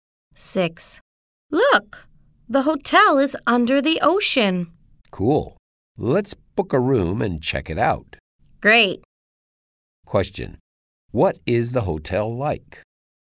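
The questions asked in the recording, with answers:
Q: Question. What is the hotel like?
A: It is under the ocean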